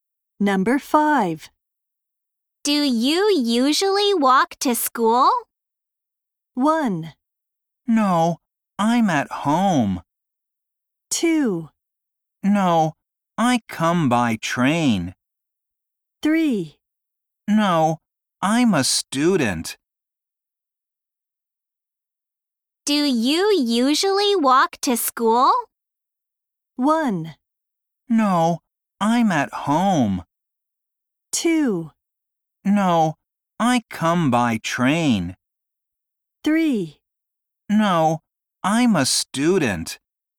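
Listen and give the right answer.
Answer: 2: No, I come by train.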